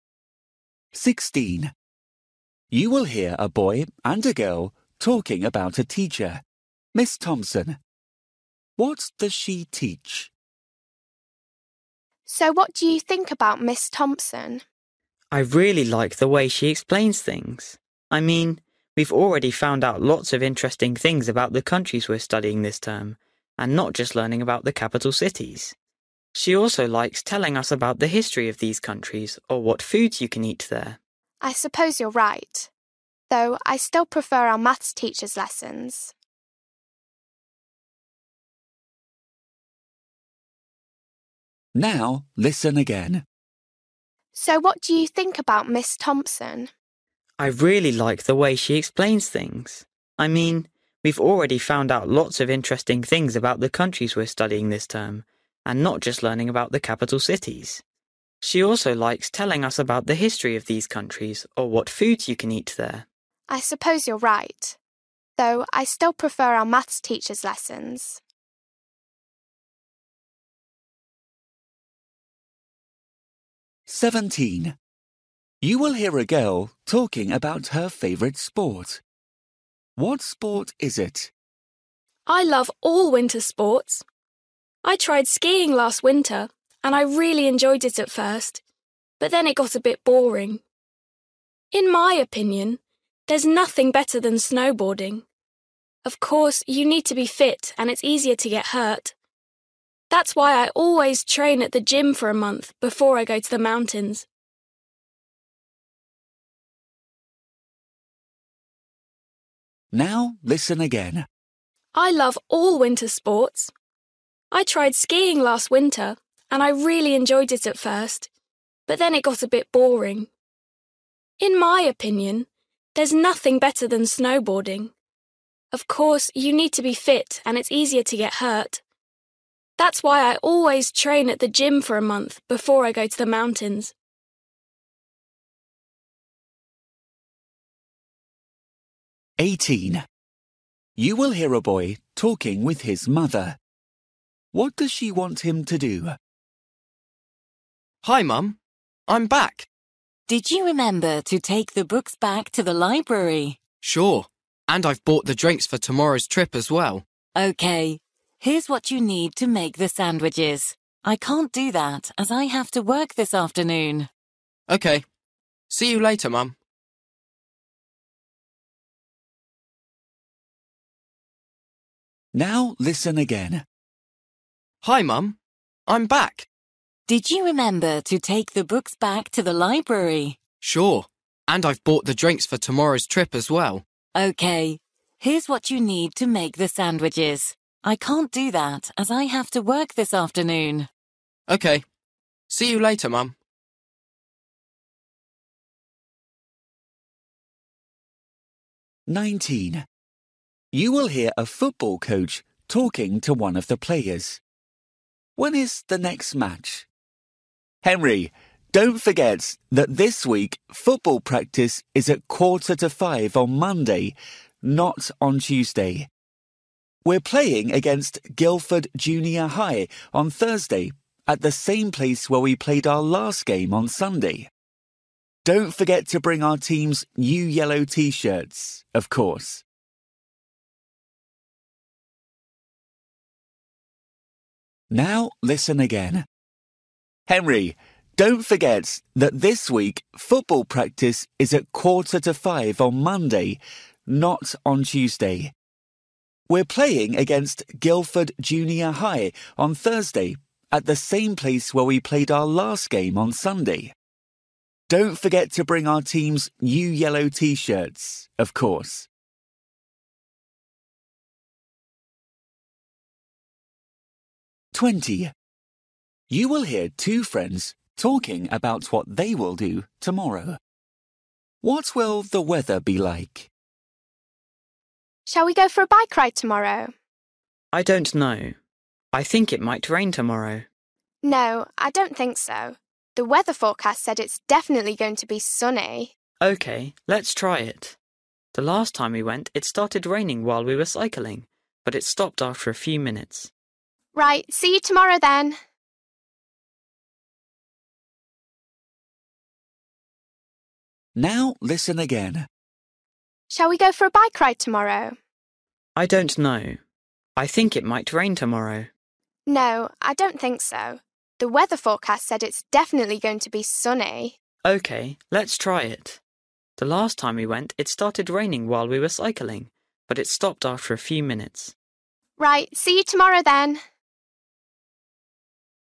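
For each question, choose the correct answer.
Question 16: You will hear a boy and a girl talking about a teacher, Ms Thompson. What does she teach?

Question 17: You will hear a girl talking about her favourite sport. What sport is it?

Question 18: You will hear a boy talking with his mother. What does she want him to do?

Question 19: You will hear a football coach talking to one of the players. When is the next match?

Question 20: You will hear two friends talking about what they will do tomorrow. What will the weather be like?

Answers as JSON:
{"16": "geography", "17": "snowboarding", "18": "make the sandwiches", "19": "Thursday", "20": "sunny"}

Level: Luyện nghe trình độ A2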